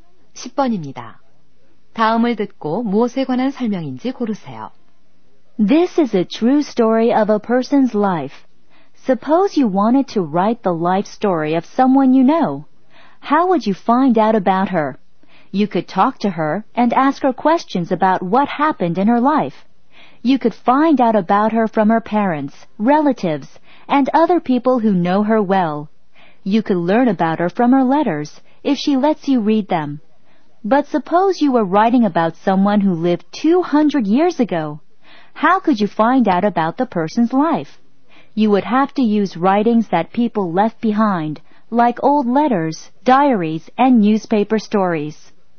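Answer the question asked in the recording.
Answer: 전기(傳記)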